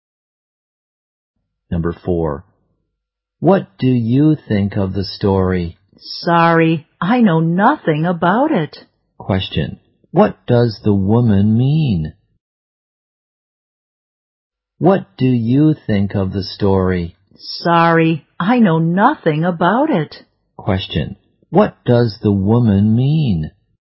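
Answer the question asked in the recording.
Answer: She knows nothing about the story.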